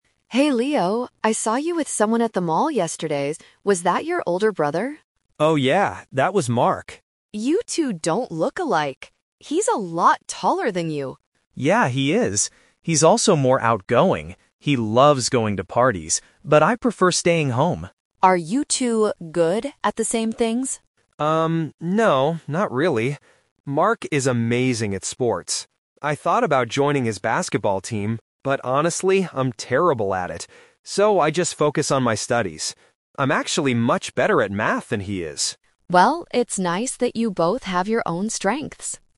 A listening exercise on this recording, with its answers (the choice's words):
Listen to the conversation between two friends. Choose the correct answer (A, B, or C) for each question.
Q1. What is true about Leo's brother, Mark?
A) He is taller and more outgoing than Leo.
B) He looks exactly like Leo.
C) He is very good at math.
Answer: He is taller and more outgoing than Leo.

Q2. What did Leo decide to do about the basketball team?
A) He joined the team because he likes sports.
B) He didn't join because he is bad at playing it.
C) He didn't join because he has to study all day.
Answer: He didn't join because he is bad at playing it.

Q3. What is Leo better at than his brother?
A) Playing basketball.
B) Going to parties.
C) Studying math.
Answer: Studying math.

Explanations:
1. This is the correct answer. The speakers clearly mention Mark is taller and more outgoing. Option (B) is a trap because Emma says "You two don't look alike". Option (C) is a trap because Leo is good at math, not Mark.
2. This is the "Twist" (A2 technique). Leo says "I thought about joining... but honestly, I'm terrible at it". Option (A) is a trap because he thought about joining, but he didn't. Option (C) is plausible but wrong; he focuses on studies because he is bad at sports, not that studies stopped him from joining.
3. This is the correct answer. Leo says "I'm actually much better at math than he is." Options (A) and (B) are traps because those are Mark's strengths, not Leo's.

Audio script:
Emma: Hey Leo, I saw you with someone at the mall yesterday. Was that your older brother?
Leo: Oh, yeah, that was Mark.
Emma: You two don't look alike! He's a lot taller than you.
Leo: Yeah, he is. He's also more outgoing. He loves going to parties, but I prefer staying home.
Emma: Are you two good at the same things?
Leo: Um, no, not really. Mark is amazing at sports. I thought about joining his basketball team, but honestly, I'm terrible at it. So, I just focus on my studies. I'm actually much better at math than he is.